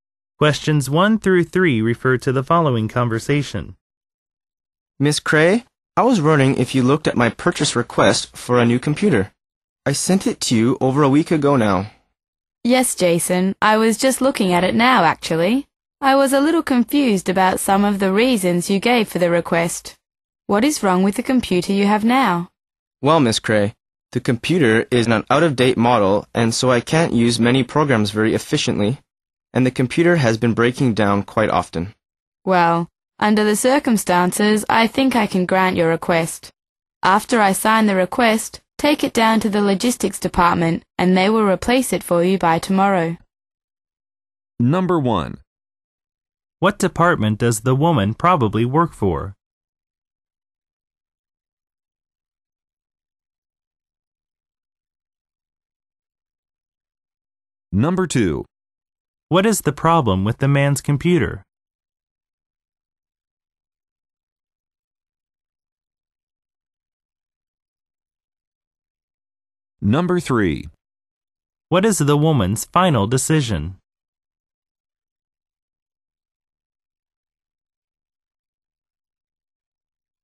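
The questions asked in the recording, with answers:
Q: What is the problem with the man's computer?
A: It is out of date and breaks down often

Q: What is the woman's final decision?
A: To approve his request for a new computer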